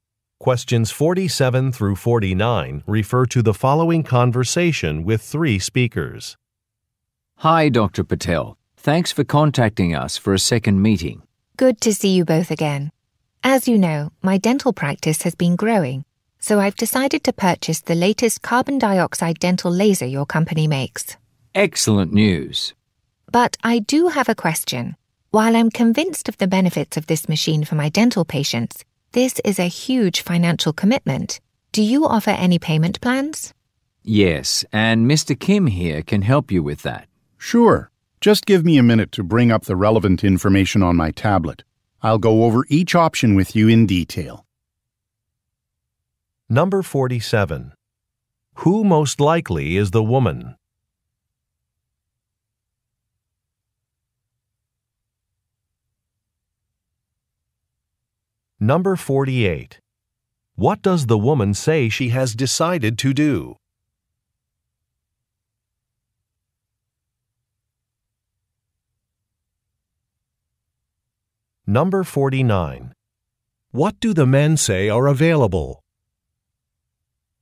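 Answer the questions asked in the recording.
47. A dentist
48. Purchase a carbon dioxide dental laser
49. Payment plans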